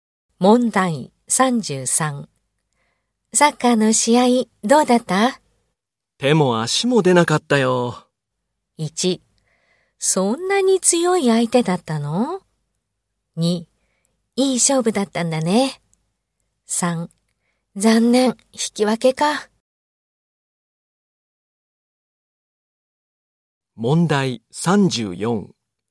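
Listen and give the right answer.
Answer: 1: そんなに強い相手だったの?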